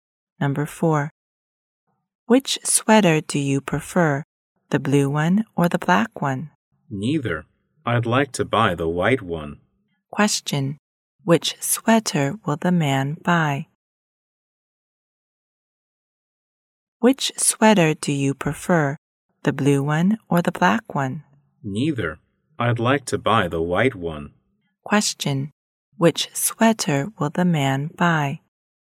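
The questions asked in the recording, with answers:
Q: Question, which sweater will the man buy?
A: The white one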